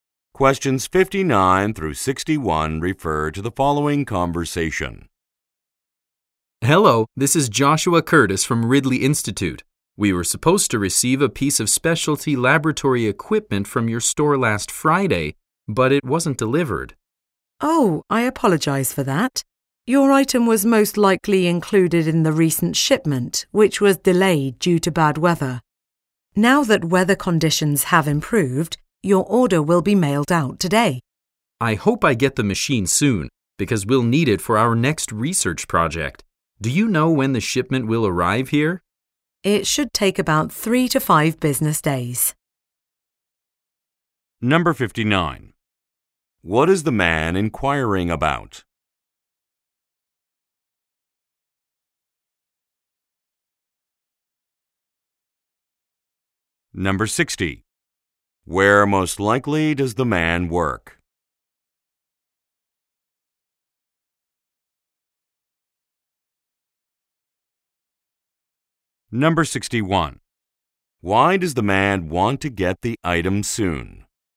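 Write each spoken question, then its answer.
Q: What is the man inquiring about?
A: A late delivery of lab equipment

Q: Where most likely does the man work?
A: At a research institute

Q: Why does the man want to get the item soon?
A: He needs it for the next research project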